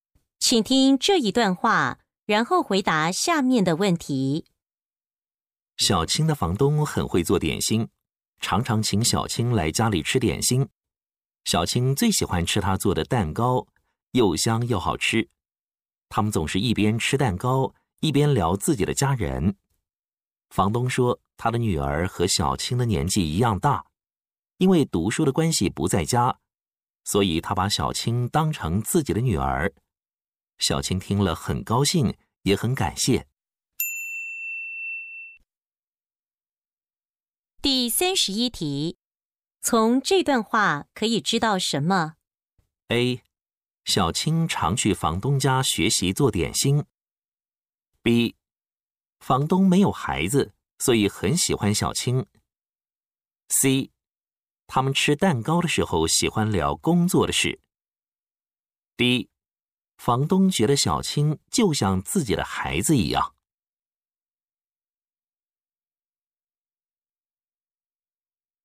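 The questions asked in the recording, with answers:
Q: 从这段话可以知道什么?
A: D: 房东觉得小青就像自己的孩子一样。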